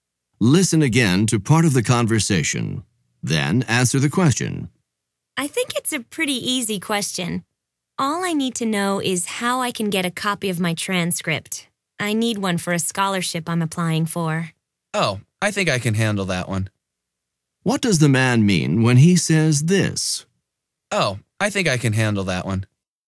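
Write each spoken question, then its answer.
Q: What does the man mean when he says this?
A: He can easily help her get a copy of her transcript.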